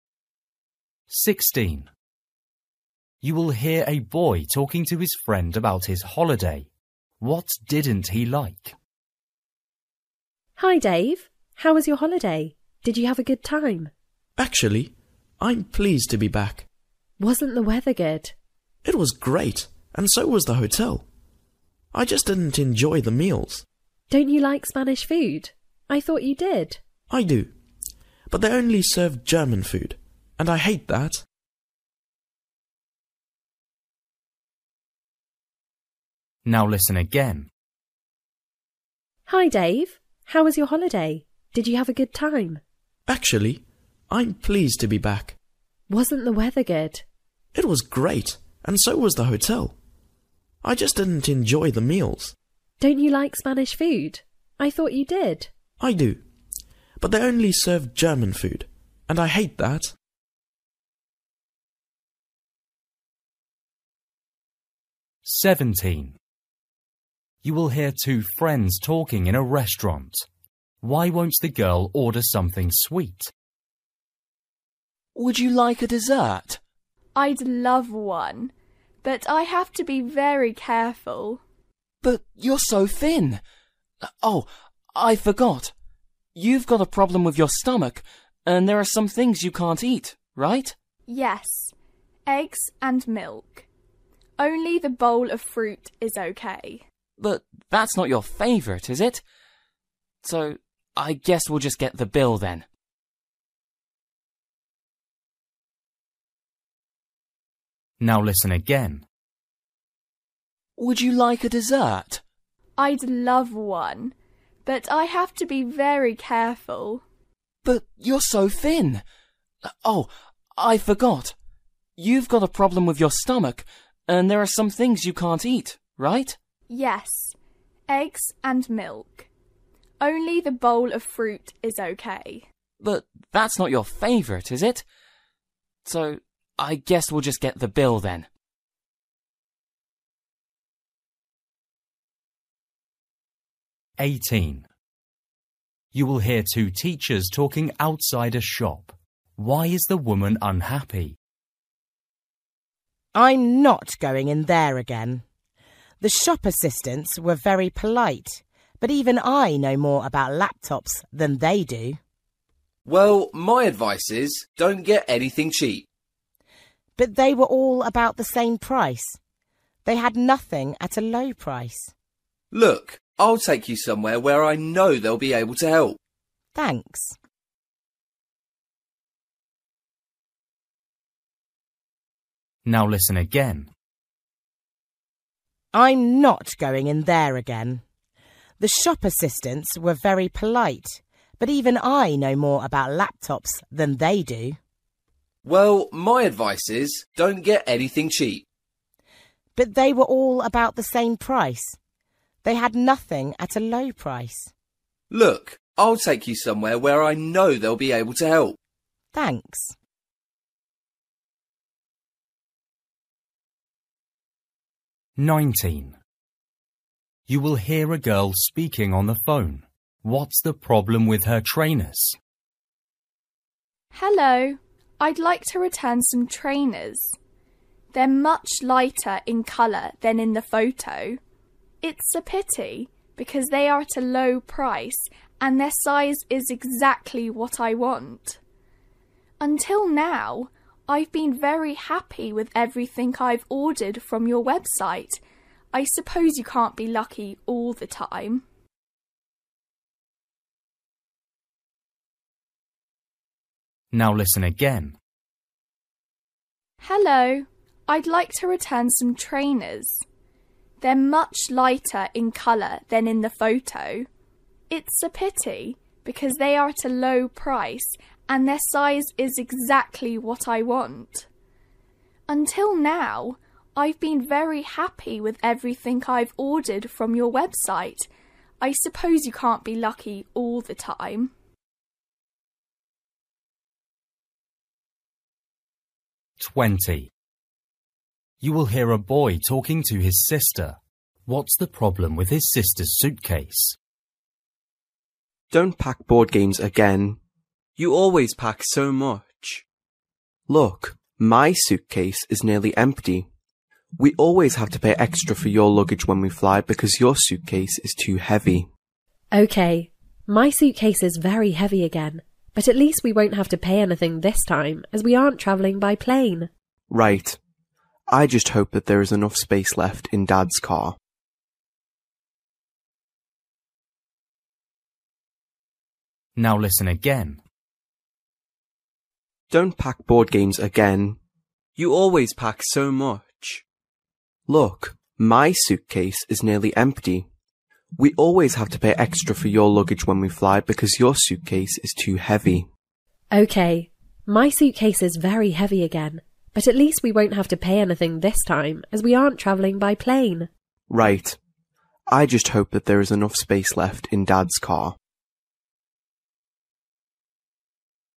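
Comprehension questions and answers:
For each question, choose the correct answer.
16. You will hear a boy talking to his friend about his holiday. What didn't he like?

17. You will hear two friends talking in a restaurant. Why won't the girl order something sweet?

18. You will hear two teachers talking outside a shop. Why is the woman unhappy?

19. You will hear a girl speaking on the phone. What's the problem with her trainers?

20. You will hear a boy talking to his sister. What's the problem with his sister's suitcase?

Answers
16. the food (meals)
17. She has a stomach problem and can't eat eggs and milk
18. The shop assistants didn't know much about laptops
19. The colour is lighter than in the photo
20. It is too heavy

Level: Luyện nghe trình độ A2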